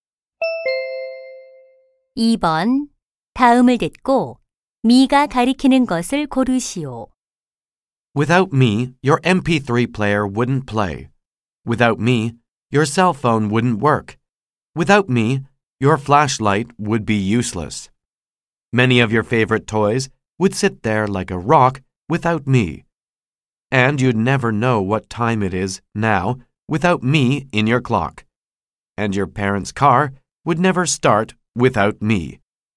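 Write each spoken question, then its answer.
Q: 다음을 듣고 미가 가리키는 것을 고르시오.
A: 배터리(건전지)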